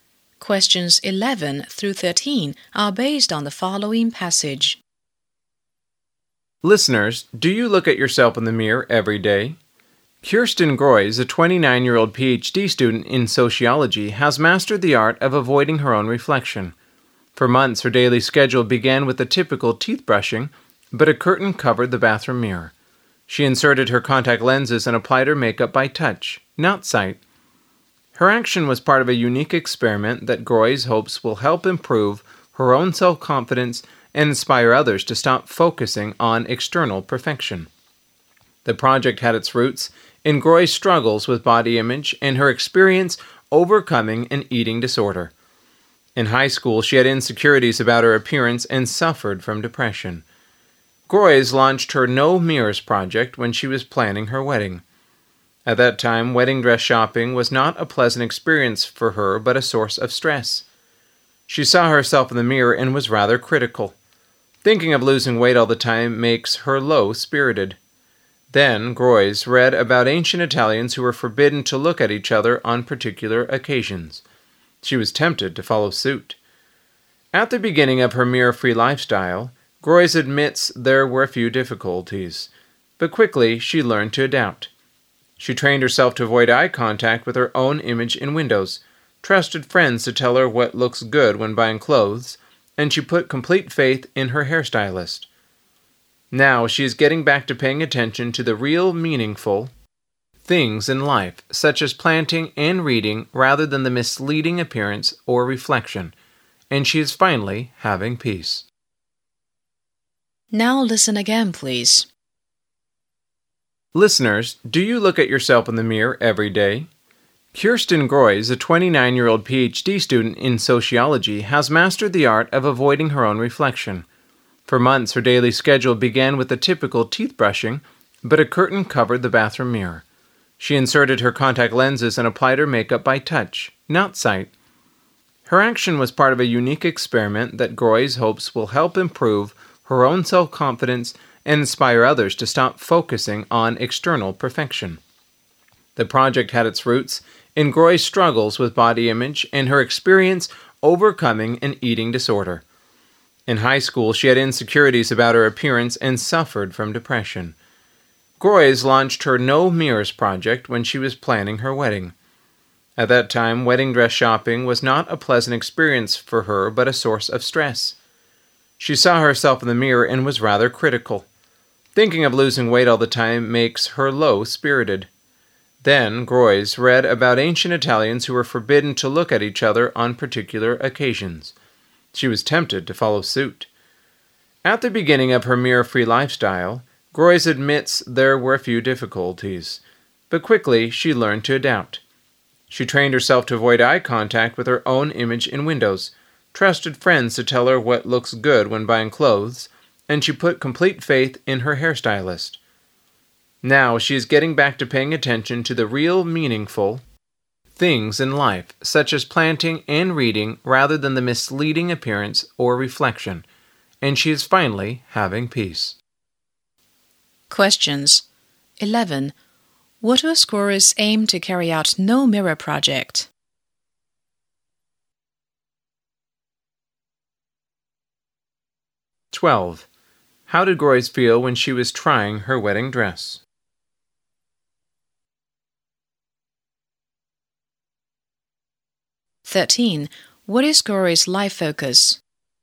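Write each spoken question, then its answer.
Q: What was Groys' aim to carry out No Mirror Project?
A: To improve her self-confidence and inspire others to stop focusing on external perfection

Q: How did Groys feel when she was trying her wedding dress?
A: Stressed

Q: What is Groys' life focus?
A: Meaningful things like planting and reading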